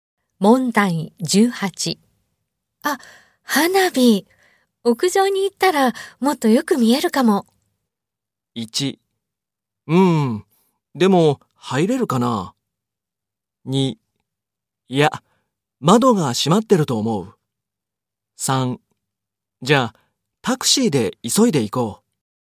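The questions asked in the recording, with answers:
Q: あ、花火。屋上に行ったらもっとよく見えるかも。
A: 1: うん、でも、入れるかな?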